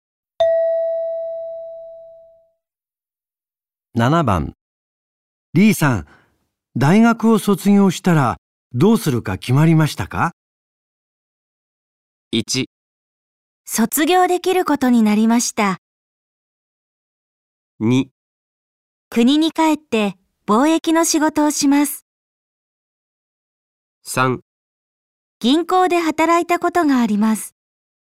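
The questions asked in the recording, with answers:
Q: リーさん、大学を卒業したらどうするか決まりましたか?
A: 2: 国に帰って貿易の仕事をします。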